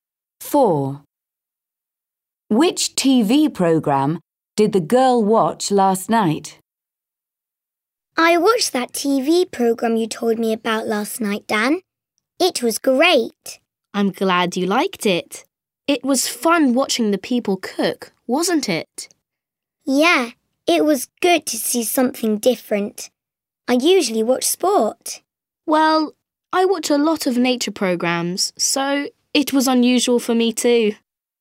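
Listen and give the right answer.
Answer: a cooking program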